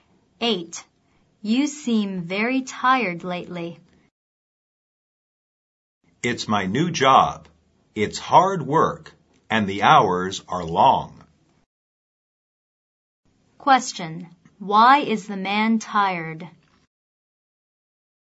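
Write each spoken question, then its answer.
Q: Why is the man tired?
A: His new job is hard work with long hours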